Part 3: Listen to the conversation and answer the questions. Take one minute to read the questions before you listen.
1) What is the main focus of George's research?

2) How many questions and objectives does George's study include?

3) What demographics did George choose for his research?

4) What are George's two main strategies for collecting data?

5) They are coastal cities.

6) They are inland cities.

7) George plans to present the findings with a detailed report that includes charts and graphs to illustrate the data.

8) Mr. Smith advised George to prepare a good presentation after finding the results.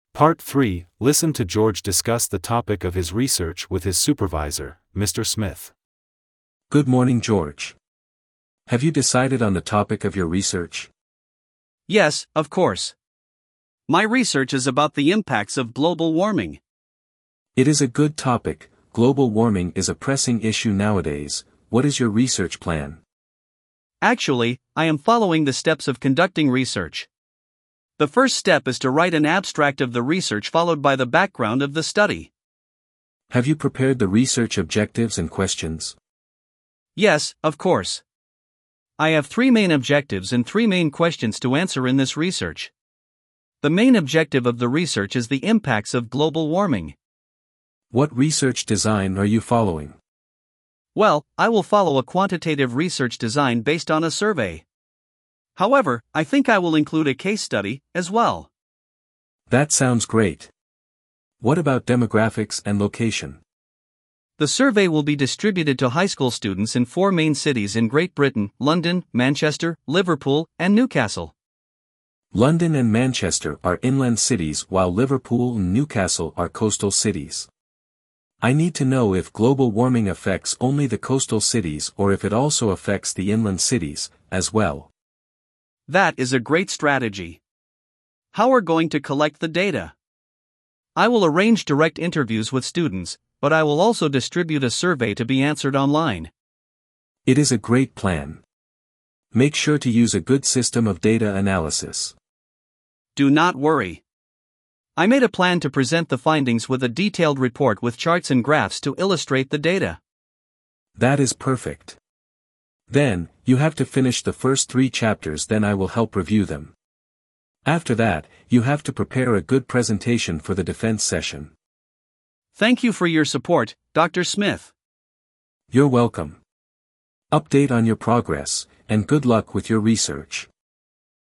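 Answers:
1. The impacts of global warming
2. Three objectives and three questions
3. High school students in four cities in Great Britain
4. Direct interviews and an online survey
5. Liverpool and Newcastle
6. London and Manchester
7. TRUE
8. TRUE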